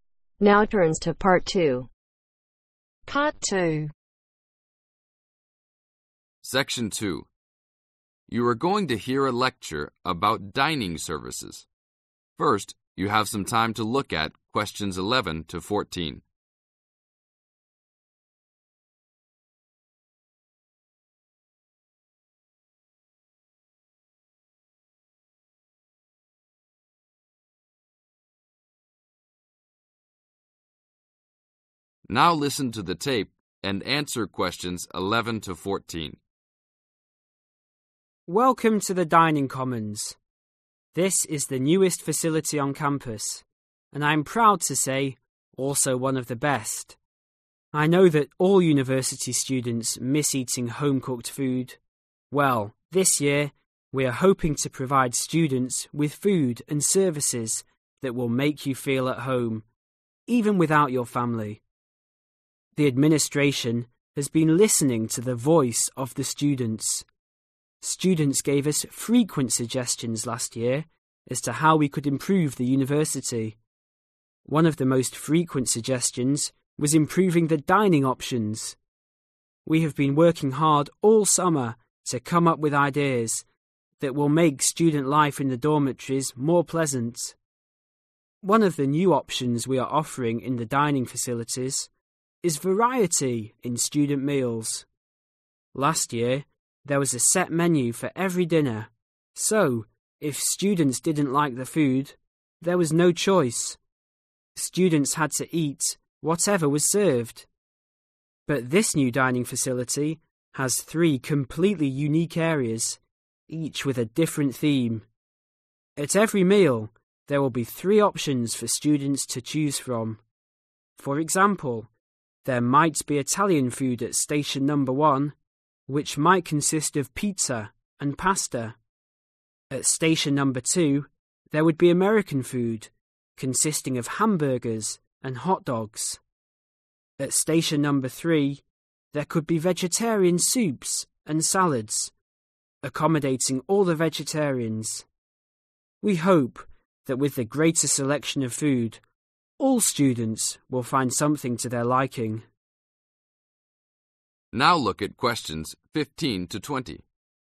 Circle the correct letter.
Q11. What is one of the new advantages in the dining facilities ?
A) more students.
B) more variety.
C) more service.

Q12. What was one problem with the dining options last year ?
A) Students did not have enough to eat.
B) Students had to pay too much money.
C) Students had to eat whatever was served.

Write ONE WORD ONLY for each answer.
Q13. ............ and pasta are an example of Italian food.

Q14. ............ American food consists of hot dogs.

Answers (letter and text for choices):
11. B) more variety.
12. C) Students had to eat whatever was served.
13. Pizza
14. Hamburgers